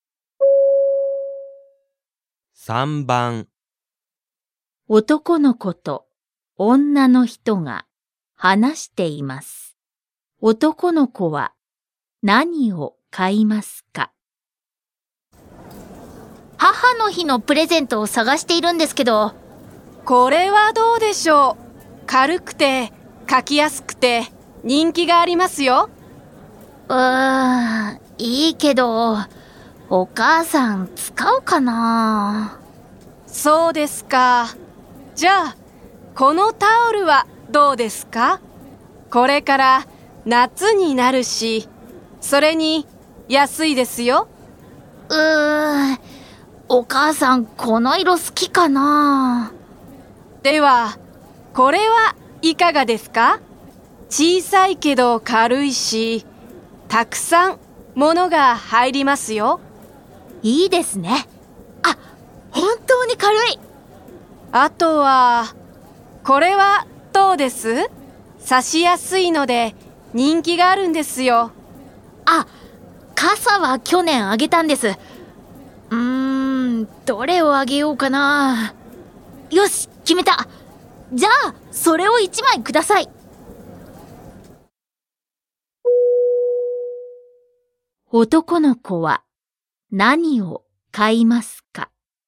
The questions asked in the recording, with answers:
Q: 男の子は何を買いますか?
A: 1. Choice 1. タオルを買います。